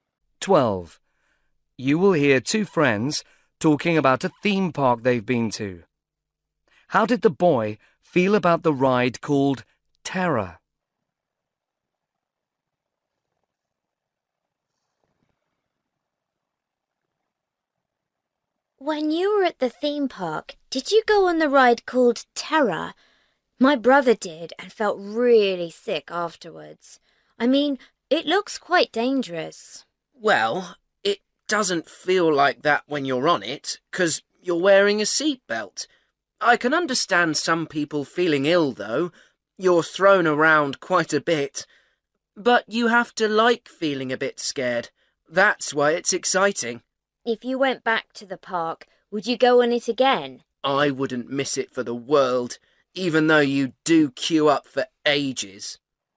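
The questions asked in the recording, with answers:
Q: How did the boy feel about the ride called Terror?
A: He enjoyed being a bit scared and would definitely ride it again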